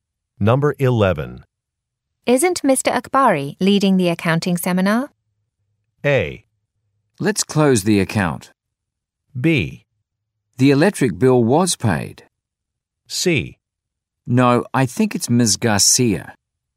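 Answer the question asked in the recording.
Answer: C: No, I think it's Ms. Garcia.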